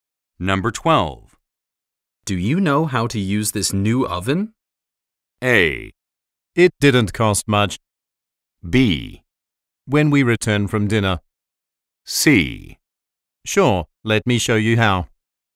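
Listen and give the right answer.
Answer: C: Sure, let me show you how.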